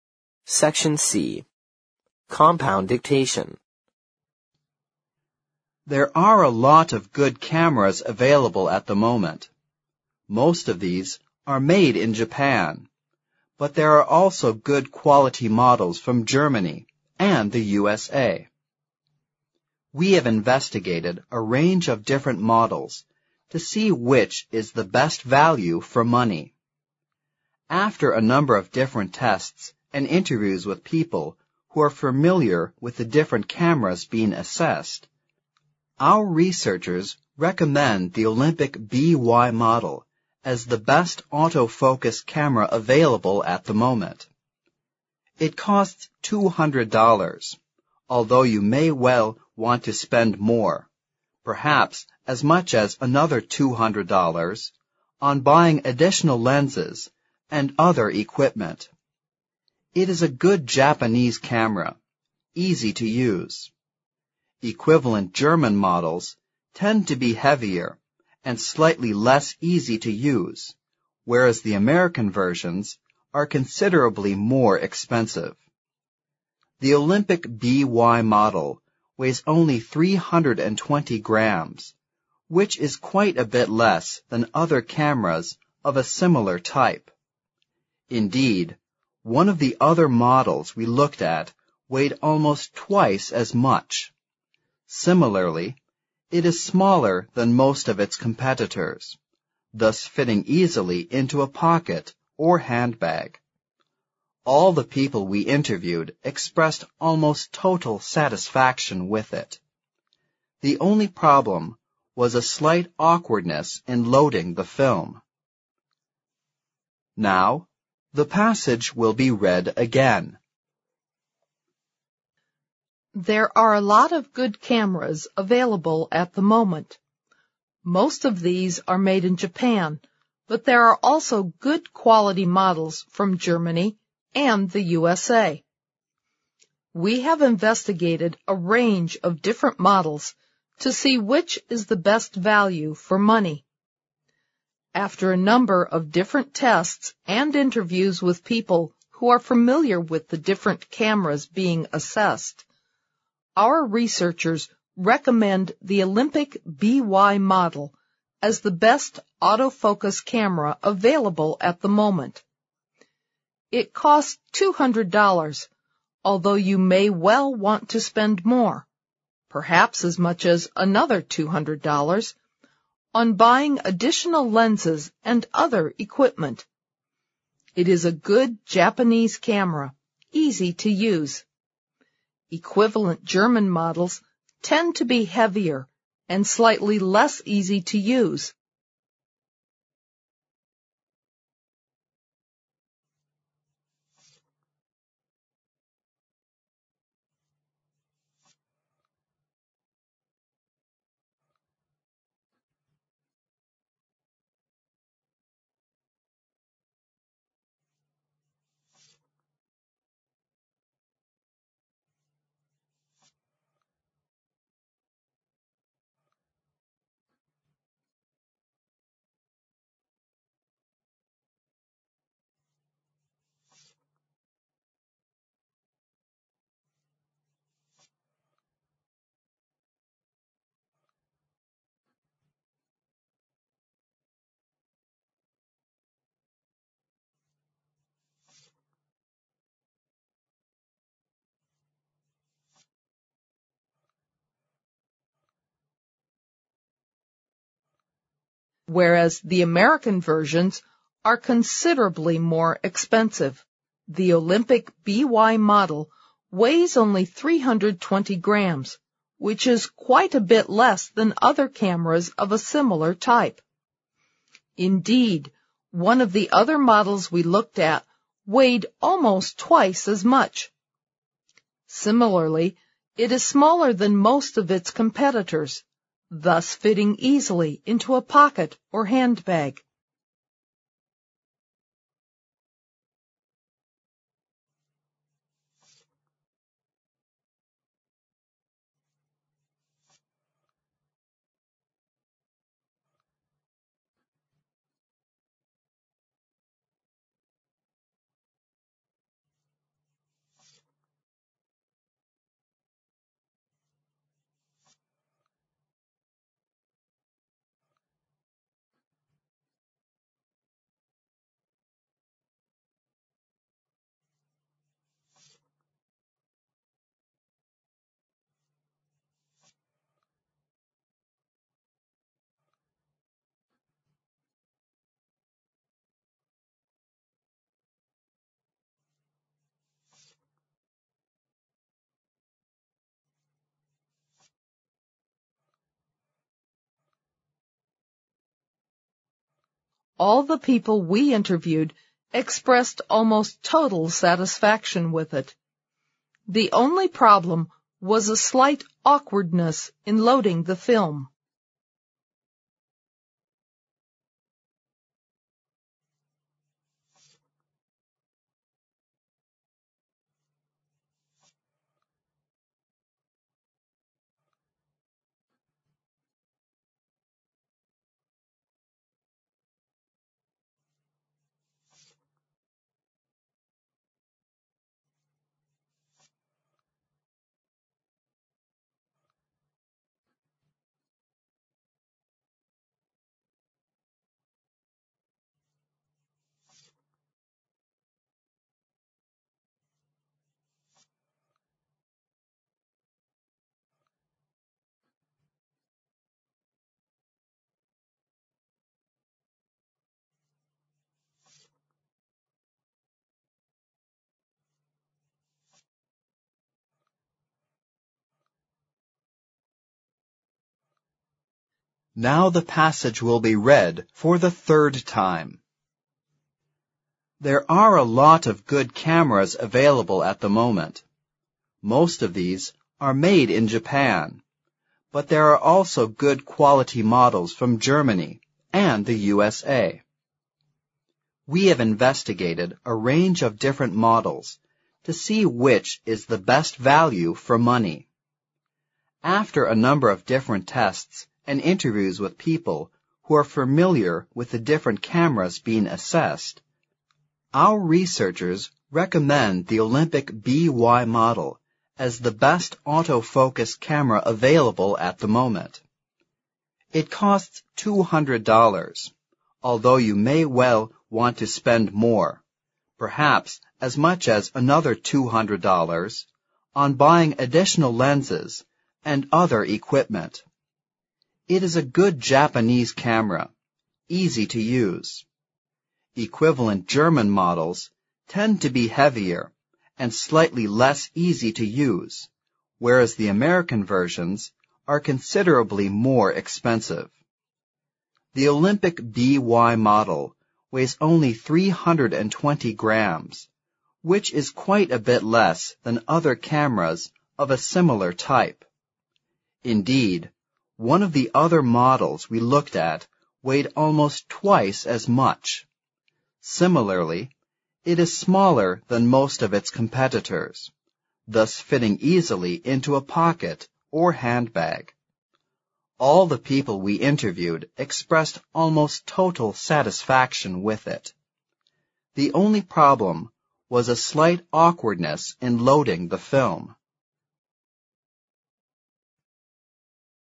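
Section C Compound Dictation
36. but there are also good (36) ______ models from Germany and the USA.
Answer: quality

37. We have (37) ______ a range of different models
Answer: investigated

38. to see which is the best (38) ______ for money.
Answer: value

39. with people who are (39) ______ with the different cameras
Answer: familiar

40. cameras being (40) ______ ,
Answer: assessed

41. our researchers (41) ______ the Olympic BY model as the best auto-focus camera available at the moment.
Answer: recommend

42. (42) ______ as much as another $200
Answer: perhaps

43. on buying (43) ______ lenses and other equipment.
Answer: additional

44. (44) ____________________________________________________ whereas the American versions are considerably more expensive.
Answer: Equivalent German models tend to be heavier and slightly less easy to use,

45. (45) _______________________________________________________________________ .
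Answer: Similarly, it is smaller than most of its competitors, thus fitting easily into a pocket or handbag

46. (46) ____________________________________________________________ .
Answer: The only problem was a slight awkwardness in loading the film

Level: 新编四级听力练习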